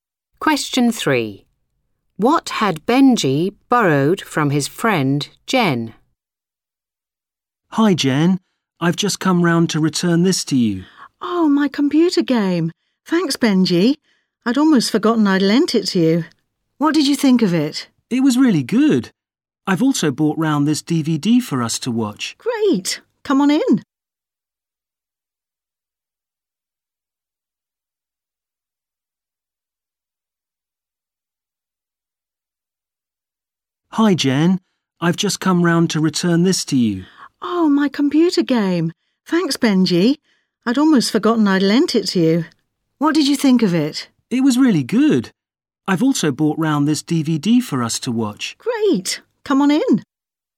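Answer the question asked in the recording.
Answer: a computer game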